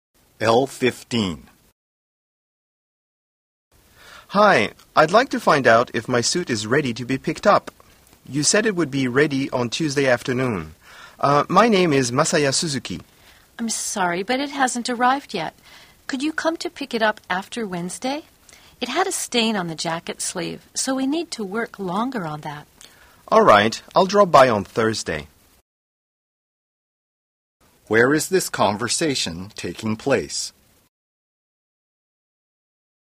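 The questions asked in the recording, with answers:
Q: Where is this conversation taking place?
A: At a dry cleaner's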